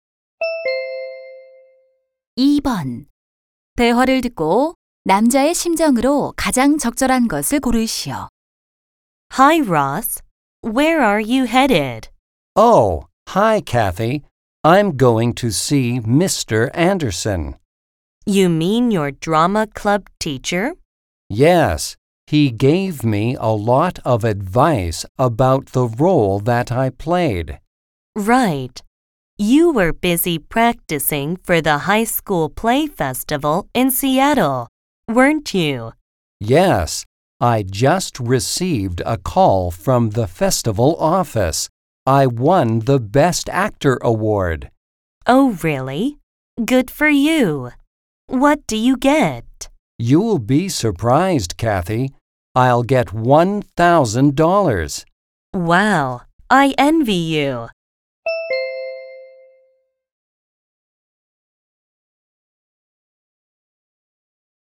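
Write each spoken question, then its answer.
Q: 대화를 듣고 남자의 심정으로 가장 적절한 것을 고르시오.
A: 기쁘고 신남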